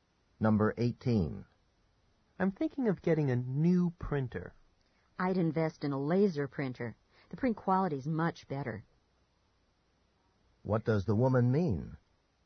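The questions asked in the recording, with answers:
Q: What does the woman mean?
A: The man should buy a laser printer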